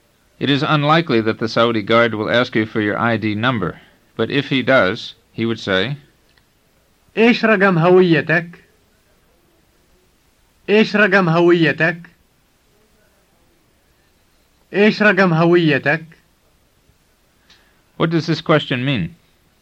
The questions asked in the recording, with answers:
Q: What does this question mean?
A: It means, what is your ID number?